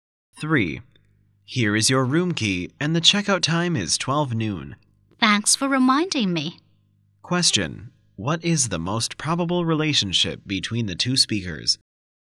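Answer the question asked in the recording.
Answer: Hotel receptionist and guest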